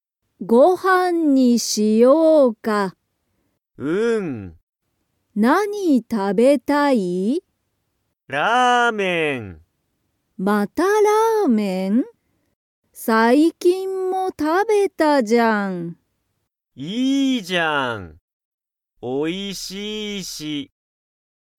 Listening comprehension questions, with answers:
Comprehension Quiz (Skip if you don't understand the conversation yet)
ひろゆきは、最近(さいきん)ラーメンを食(た)べましたか?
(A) はい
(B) いいえ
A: (A) はい

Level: Level 1

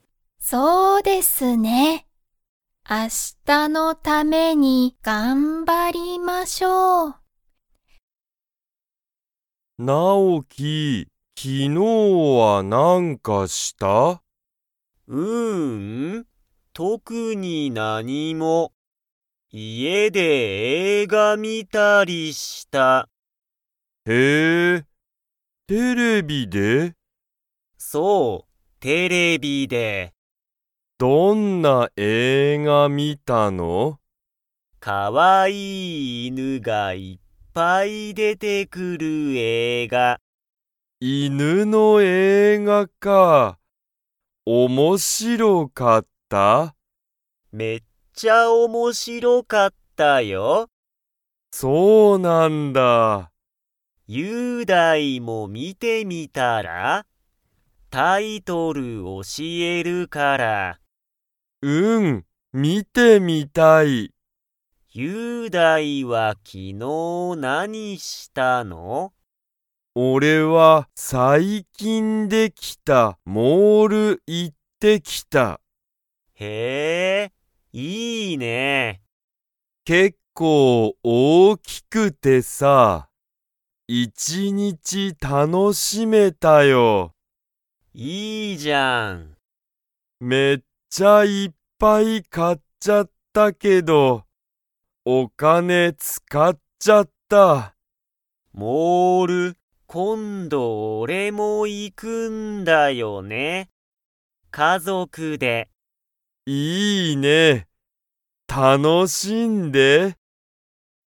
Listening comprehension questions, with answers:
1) なおきも、昨日(きのう)モールに行(い)きましたか?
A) はい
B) いいえ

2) そのモールは、____できた。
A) 最近(さいきん)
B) 一日(いちにち)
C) 昨日(きのう)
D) 結構(けっこう))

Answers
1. B) いいえ
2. A) 最近(さいきん)

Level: Level 2

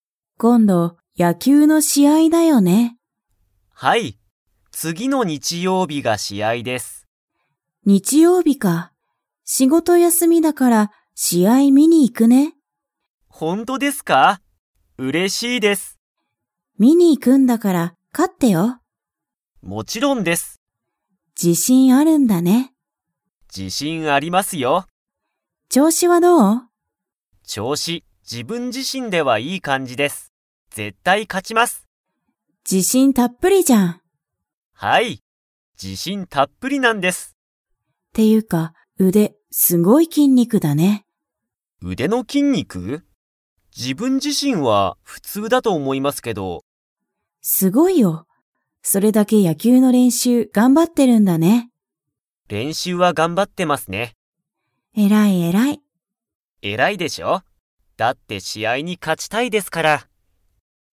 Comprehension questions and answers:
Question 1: ゆりこは、野球やきゅうの試合しあいを見みに行いきますか?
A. はい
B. いいえ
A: A. はい

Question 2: しんじは、 の筋肉きんにくがすごい。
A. 足あし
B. 肩かた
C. 腕うで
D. 背中せなか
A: C. 腕うで

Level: Level 4

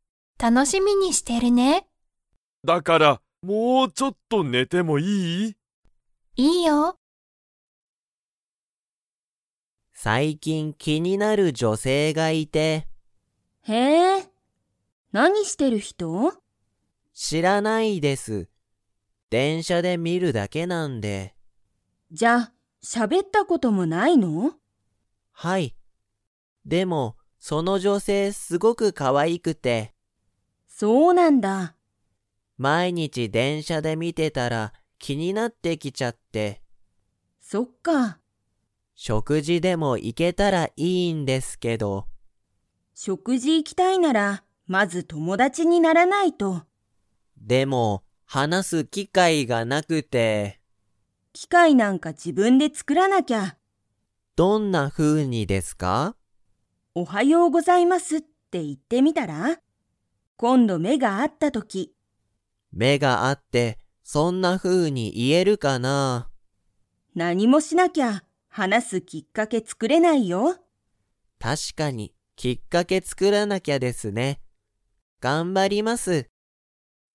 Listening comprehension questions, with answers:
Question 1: 佐藤さとうさんは気きになる女性じょせいと喋しゃべったことが 。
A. ある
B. ない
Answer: B. ない

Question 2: 佐藤さとうさんは、女性じょせいと何なにがしたいですか?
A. 食事しょくじに行いきたい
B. 一緒いっしょに料理りょうりしたい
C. カラオケに行いきたい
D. 電車でんしゃに乗のりたい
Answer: A. 食事しょくじに行いきたい

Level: Level 3

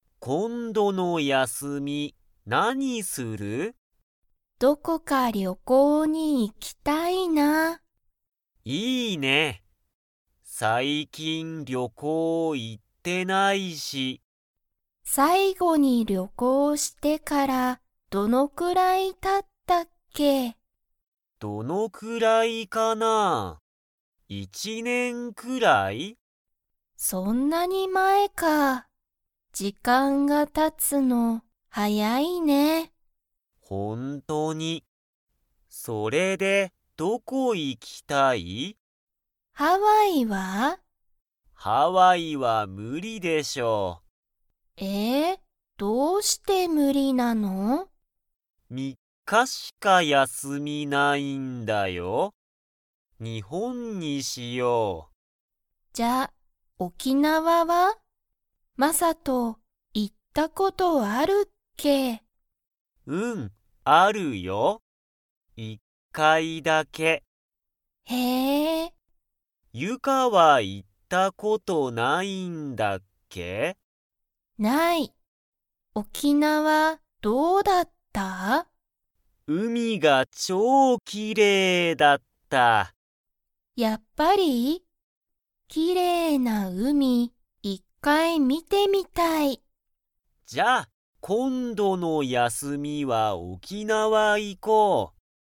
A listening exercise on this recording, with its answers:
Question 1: マサトは沖縄おきなわに行いったことが 。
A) ある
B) ない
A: A) ある

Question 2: 二人ふたりは、今度こんどの休やすみどこに行いきますか?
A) ハワイ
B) 東京とうきょう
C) フランス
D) 沖縄おきなわ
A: D) 沖縄おきなわ

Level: Level 3

